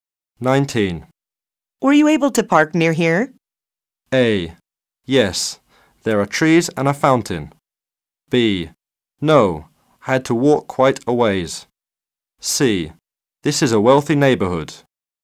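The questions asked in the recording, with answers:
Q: Were you able to park near here?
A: B: No, I had to walk quite a ways.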